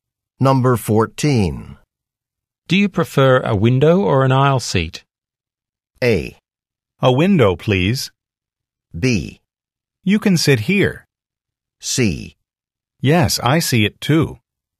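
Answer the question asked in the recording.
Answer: A: A window, please.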